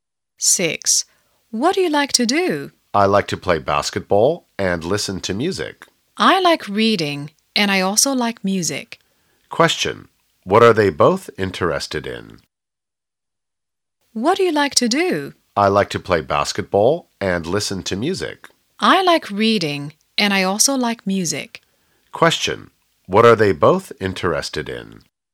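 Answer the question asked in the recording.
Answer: Music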